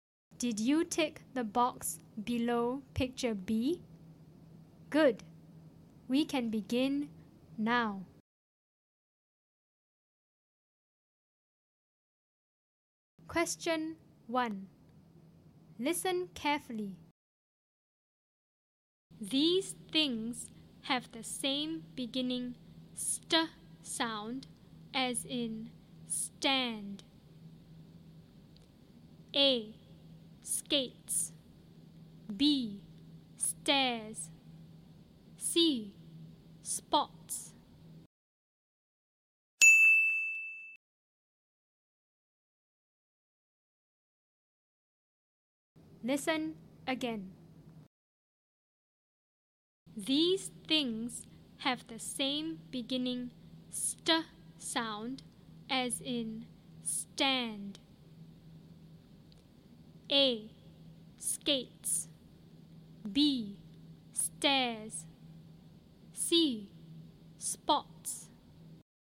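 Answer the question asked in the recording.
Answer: B: Stairs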